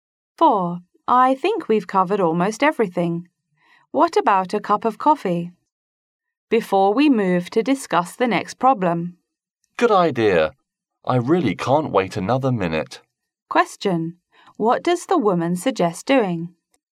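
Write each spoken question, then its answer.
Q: What does the woman suggest doing?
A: Having a coffee break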